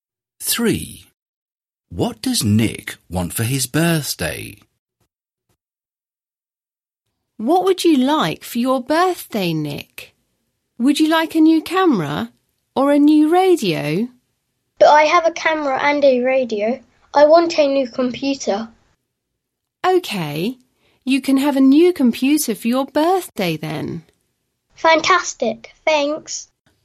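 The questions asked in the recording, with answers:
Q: What does Nick want for his birthday?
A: a new computer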